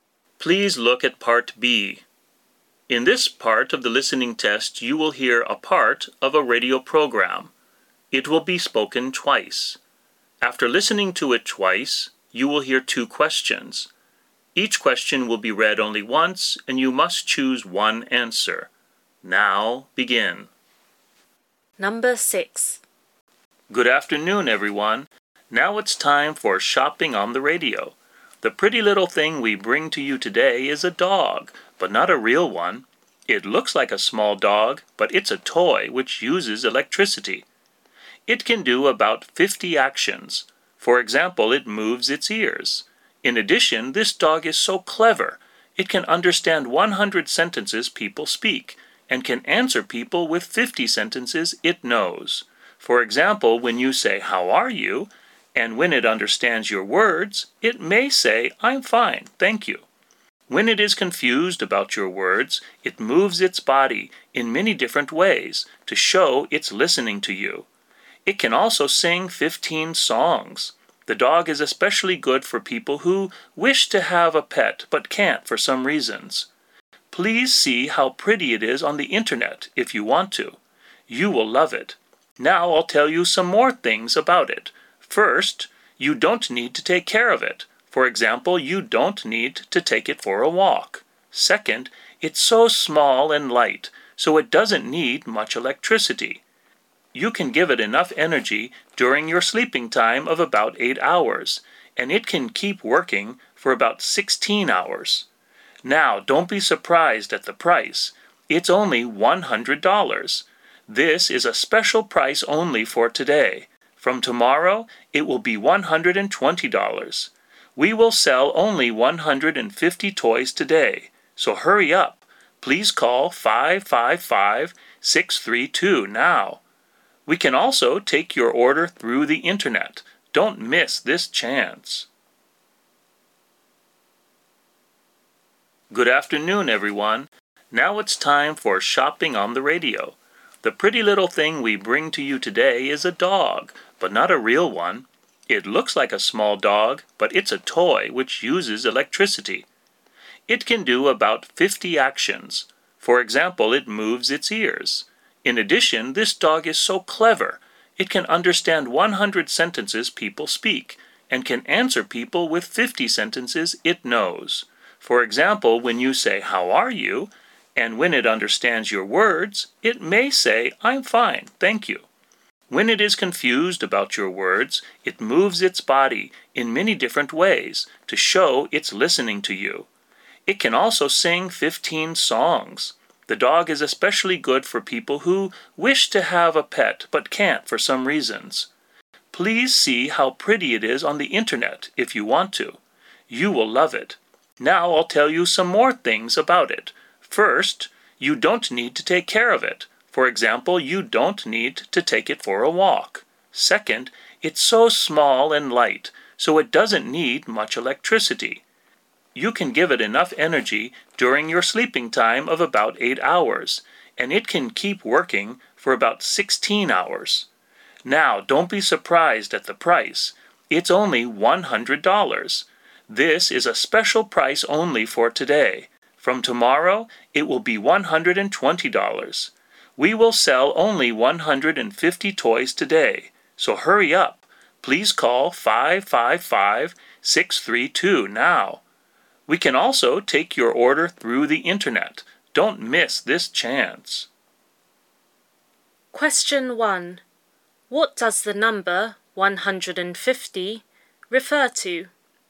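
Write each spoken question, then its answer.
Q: What does the number 150 refer to?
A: The number of toys that will be sold today.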